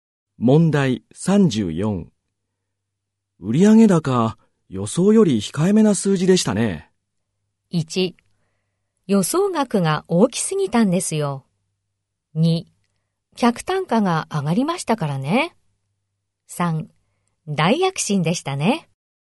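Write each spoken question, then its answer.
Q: 売上高、予想より控えめな数字でしたね。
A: 1: 予想額が大きすぎたんですよ。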